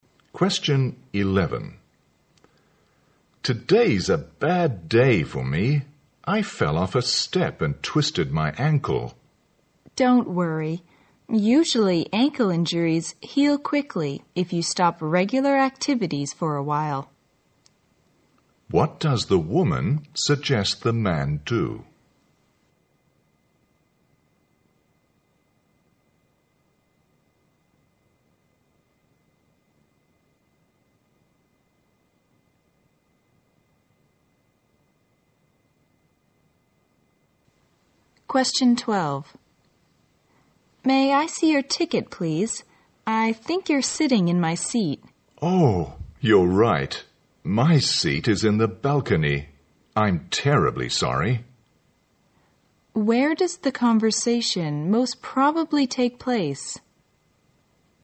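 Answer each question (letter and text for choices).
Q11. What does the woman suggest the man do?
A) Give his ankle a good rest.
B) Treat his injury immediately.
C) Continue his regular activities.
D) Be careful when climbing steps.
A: A) Give his ankle a good rest.

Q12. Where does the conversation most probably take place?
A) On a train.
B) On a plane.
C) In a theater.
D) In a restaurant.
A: C) In a theater.

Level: 大学英语四级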